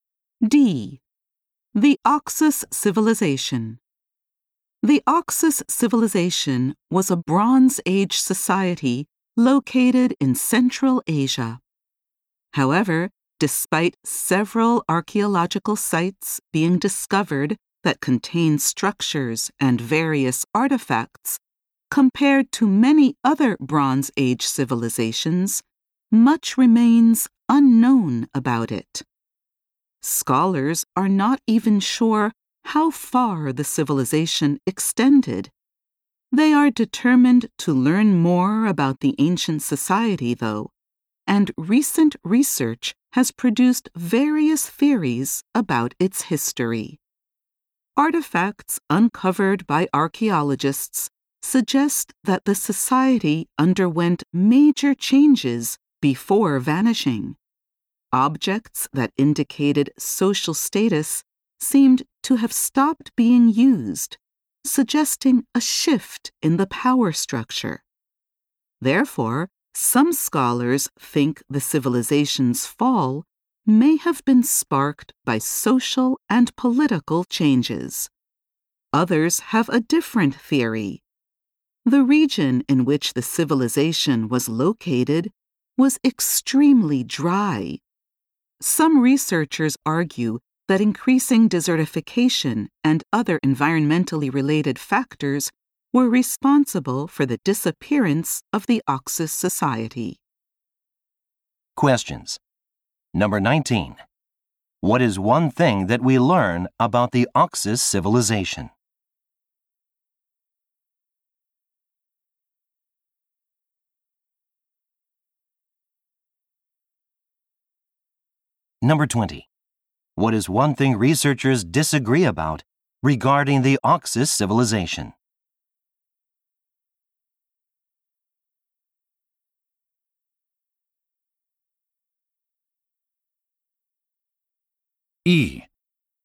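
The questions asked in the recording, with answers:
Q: What is one thing that we learn about the Oxus civilization?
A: Much about it remains unknown, even how far it extended.

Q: What is one thing researchers disagree about regarding the Oxus civilization?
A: Why it disappeared.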